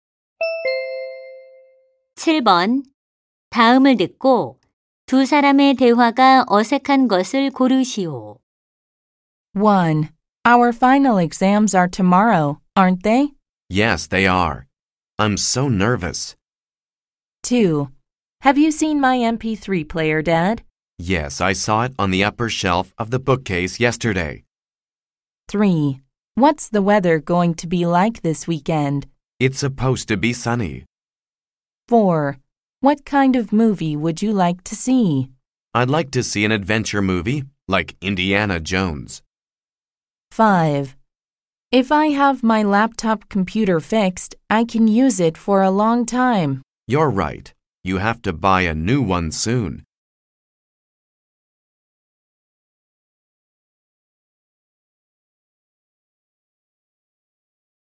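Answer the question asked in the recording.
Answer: 5: If I have my laptop computer fixed, I can use it for a long time. / You're right. You have to buy a new one soon.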